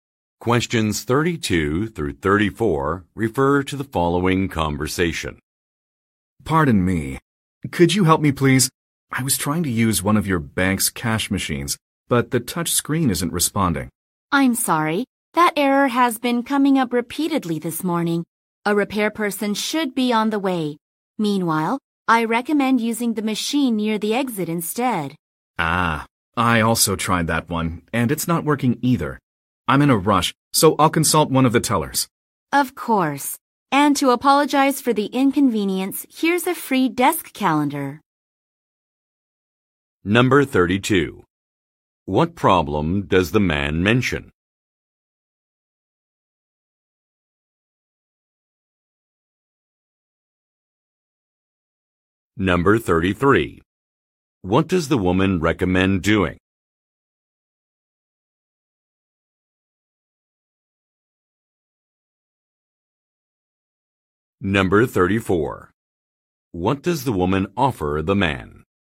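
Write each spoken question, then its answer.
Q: What problem does the man mention?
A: The cash machine's touch screen isn't responding.

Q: What does the woman recommend doing?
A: Using the machine near the exit.

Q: What does the woman offer the man?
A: A free desk calendar.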